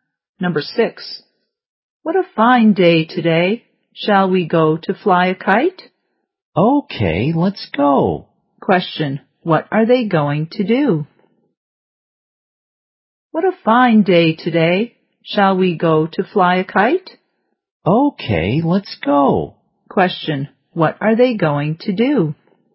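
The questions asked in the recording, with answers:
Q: Question, what are they going to do?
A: Fly a kite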